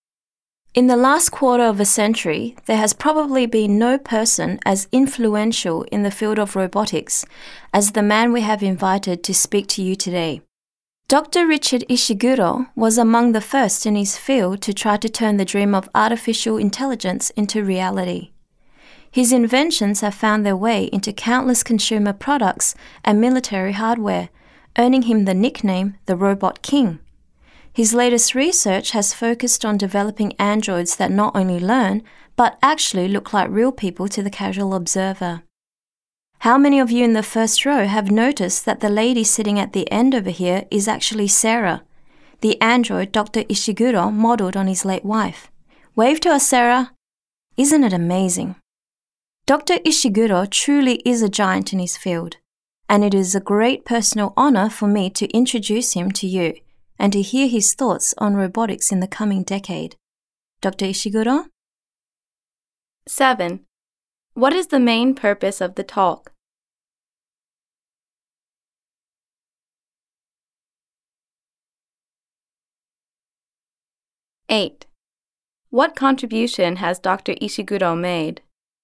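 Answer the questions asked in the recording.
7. To introduce Dr. Ishiguro as a speaker
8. He was among the first to turn artificial intelligence into reality; his inventions are used in consumer products and military hardware
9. An android Dr. Ishiguro modeled on his late wife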